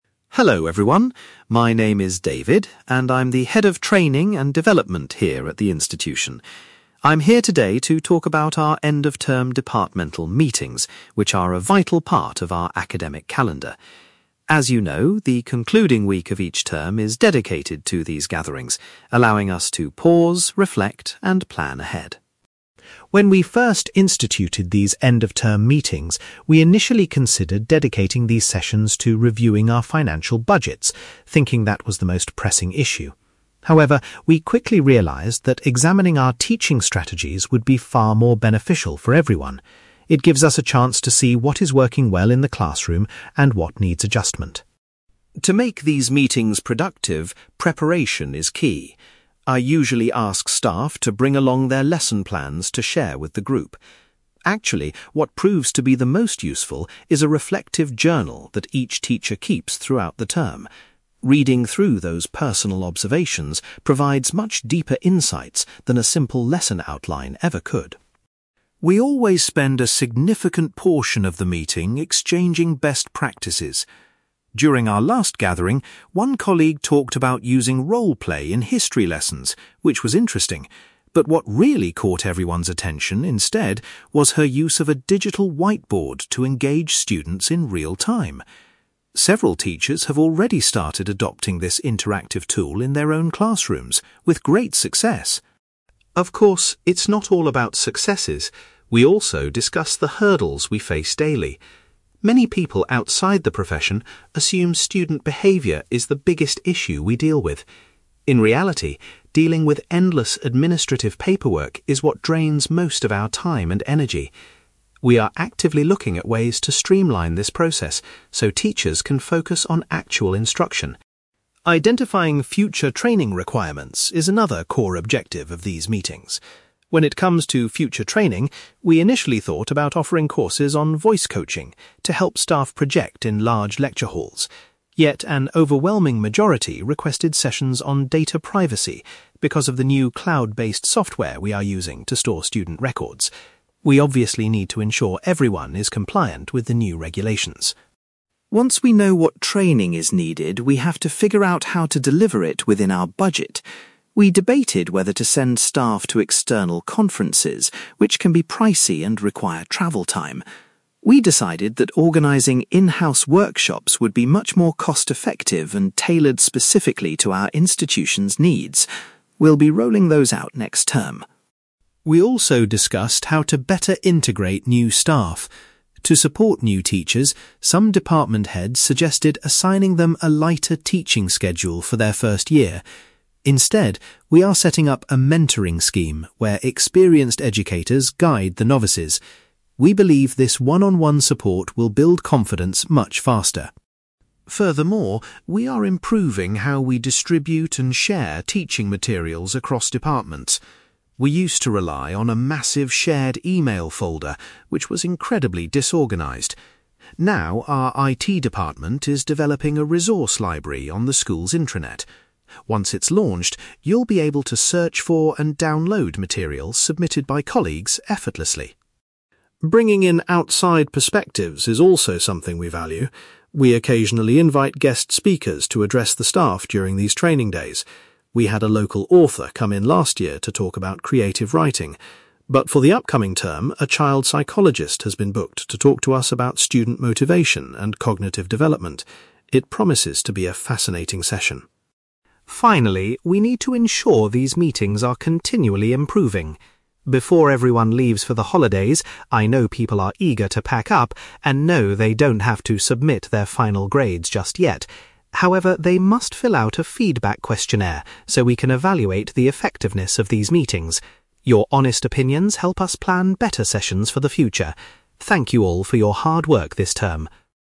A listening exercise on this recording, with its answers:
You will hear a Training Manager called David talking about end-of-term departmental meetings. For questions 9-18, complete the sentences with a word or short phrase.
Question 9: David explains that the primary focus of the departmental meetings is to review current (9)........................... .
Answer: teaching strategies

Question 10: Teachers are asked to bring a (10)........................... to the meetings because it is highly useful.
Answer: reflective journal

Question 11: At the previous meeting, staff were particularly interested in the use of a (11)........................... to improve student engagement.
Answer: digital whiteboard

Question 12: David notes that the staff's biggest challenge is the amount of (12)........................... they have to complete.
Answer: administrative paperwork

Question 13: Due to new software, the majority of staff have requested training courses on (13)........................... .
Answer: data privacy

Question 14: The institution has decided to provide (14)........................... because they are a cheaper and more specific option.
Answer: in-house workshops

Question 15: Next term, a (15)........................... will be introduced to help support less experienced teachers.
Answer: mentoring scheme

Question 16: Staff will soon be able to share materials using a newly developed (16)........................... on the school's intranet.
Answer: resource library

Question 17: For the next term, a (17)........................... is scheduled to speak to the staff about motivating students.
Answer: child psychologist

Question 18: Before the holidays begin, every staff member is required to complete a (18)........................... .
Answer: feedback questionnaire

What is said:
David: Hello everyone, my name is David, and I'm the Head of Training and Development here at the institution. I'm here today to talk about our end-of-term departmental meetings, which are a vital part of our academic calendar. As you know, the concluding week of each term is dedicated to these gatherings, allowing us to pause, reflect, and plan ahead.
When we first instituted these end-of-term meetings, we initially considered dedicating these sessions to reviewing our financial budgets, thinking that was the most pressing issue. However, we quickly realised that examining our teaching strategies would be far more beneficial for everyone. It gives us a chance to see what is working well in the classroom and what needs adjustment.
To make these meetings productive, preparation is key. I usually ask staff to bring along their lesson plans to share with the group. Actually, what proves to be the most useful is a reflective journal that each teacher keeps throughout the term. Reading through those personal observations provides much deeper insights than a simple lesson outline ever could.
We always spend a significant portion of the meeting exchanging best practices. During our last gathering, one colleague talked about using role-play in history lessons, which was interesting. But what really caught everyone's attention instead was her use of a digital whiteboard to engage students in real-time. Several teachers have already started adopting this interactive tool in their own classrooms with great success.
Of course, it's not all about successes; we also discuss the hurdles we face daily. Many people outside the profession assume student behaviour is the biggest issue we deal with. In reality, dealing with endless administrative paperwork is what drains most of our time and energy. We are actively looking at ways to streamline this process so teachers can focus on actual instruction.
Identifying future training requirements is another core objective of these meetings. When it comes to future training, we initially thought about offering courses on voice coaching to help staff project in large lecture halls. Yet, an overwhelming majority requested sessions on data privacy because of the new cloud-based software we are using to store student records. We obviously need to ensure everyone is compliant with the new regulations.
Once we know what training is needed, we have to figure out how to deliver it within our budget. We debated whether to send staff to external conferences, which can be pricey and require travel time. We decided that organising in-house workshops would be much more cost-effective and tailored specifically to our institution's needs. We'll be rolling those out next term.
We also discussed how to better integrate new staff. To support new teachers, some department heads suggested assigning them a lighter teaching schedule for their first year. Instead, we are setting up a mentoring scheme where experienced educators guide the novices. We believe this one-on-one support will build confidence much faster.
Furthermore, we are improving how we distribute and share teaching materials across departments. We used to rely on a massive shared email folder, which was incredibly disorganised. Now, our IT department is developing a resource library on the school's intranet. Once it's launched, you'll be able to search for and download materials submitted by colleagues effortlessly.
Bringing in outside perspectives is also something we value. We occasionally invite guest speakers to address the staff during these training days. We had a local author come in last year to talk about creative writing, but for the upcoming term, a child psychologist has been booked to talk to us about student motivation and cognitive development. It promises to be a fascinating session.
Finally, we need to ensure these meetings are continually improving. Before everyone leaves for the holidays, I know people are eager to pack up, and no, they don't have to submit their final grades just yet. However, they must fill out a feedback questionnaire so we can evaluate the effectiveness of these meetings. Your honest opinions help us plan better sessions for the future. Thank you all for your hard work this term.

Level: B2